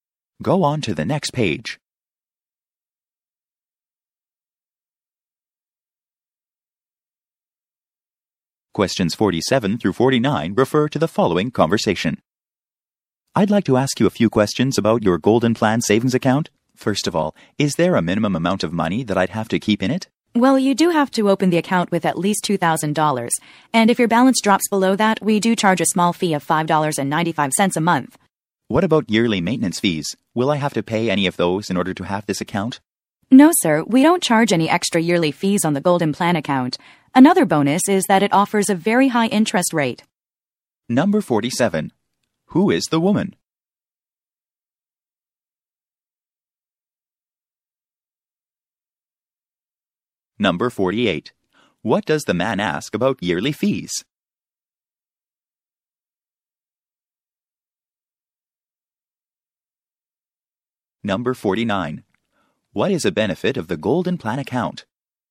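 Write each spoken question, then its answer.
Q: Who is the woman?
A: A bank employee

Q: What does the man ask about yearly fees?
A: Whether he will have to pay any yearly maintenance fees

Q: What is a benefit of the Golden Plan account?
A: A very high interest rate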